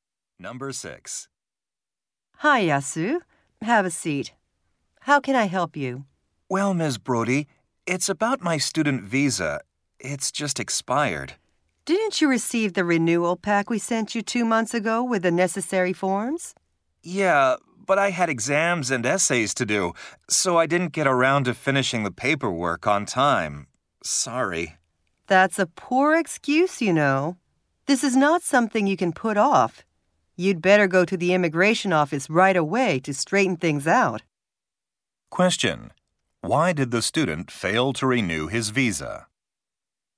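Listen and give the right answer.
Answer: He was busy with exams and essays and didn't finish the paperwork on time.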